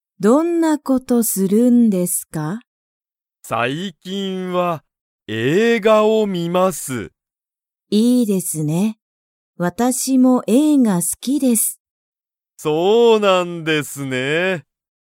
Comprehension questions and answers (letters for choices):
Comprehension Quiz (Skip if you don't understand the conversation yet)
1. 山田(やまだ)さんは映画(えいが)が好(す)きですか?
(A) はい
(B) いいえ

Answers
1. A

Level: Level 1